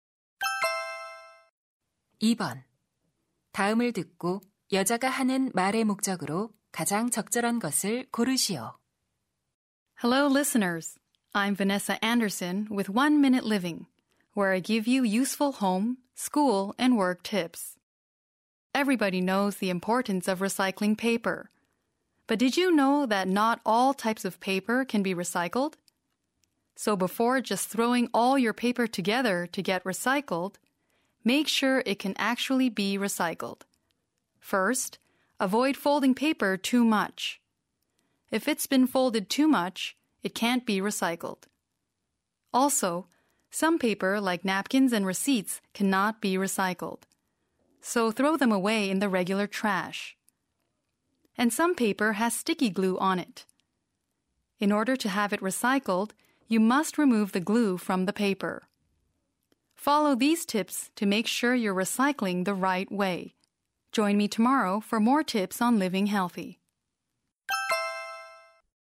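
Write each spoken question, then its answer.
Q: 다음을 듣고 여자가 하는 말의 목적으로 가장 적절한 것을 고르시오.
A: 종이를 올바르게 재활용하는 방법을 알려 주려고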